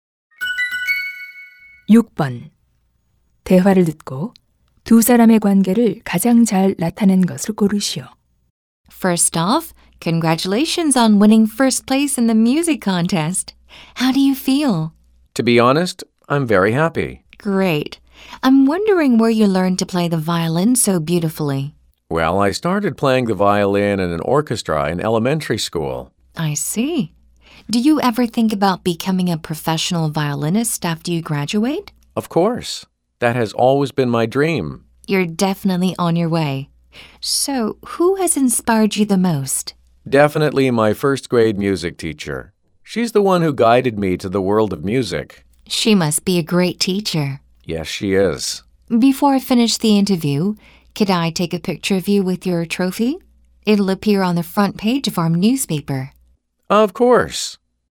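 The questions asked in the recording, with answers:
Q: 대화를 듣고 두 사람의 관계를 가장 잘 나타낸 것을 고르시오.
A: 신문 기자 - 바이올린 연주자(음악 대회 우승자)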